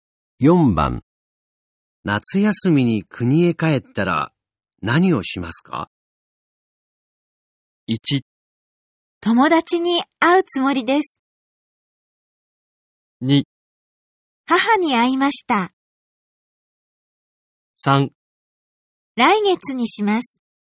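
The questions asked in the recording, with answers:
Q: 夏休みに国へ帰ったら、何をしますか?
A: 1: 友達に会うつもりです。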